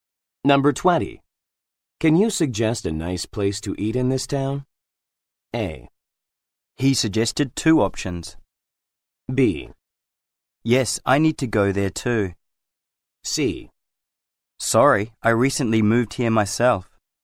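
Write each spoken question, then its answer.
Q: Can you suggest a nice place to eat in this town?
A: C: Sorry, I recently moved here myself.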